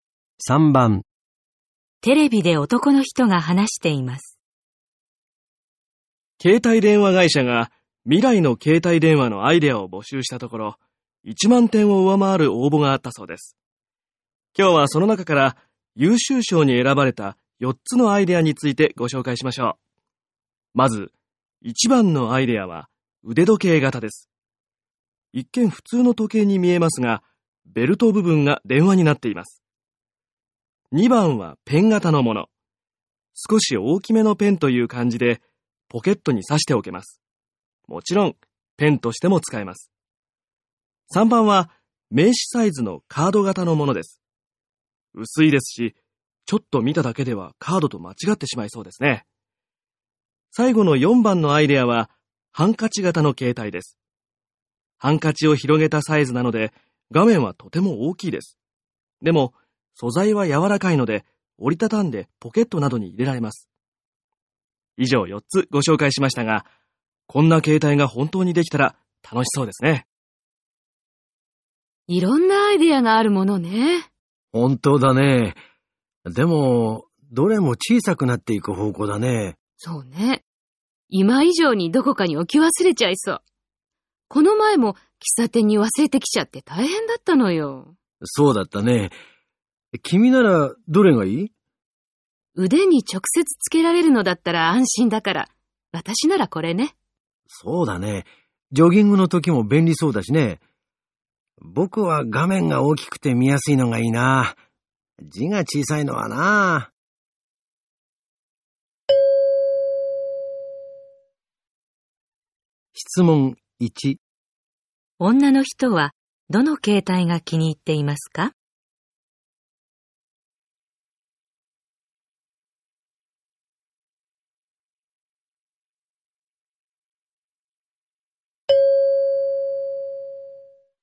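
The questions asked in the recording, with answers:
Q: 女の人はどの携帯が気に入っていますか?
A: 1番の腕時計型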